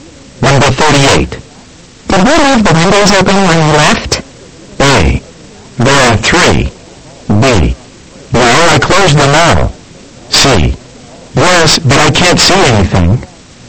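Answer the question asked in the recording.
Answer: B: No, I closed them all.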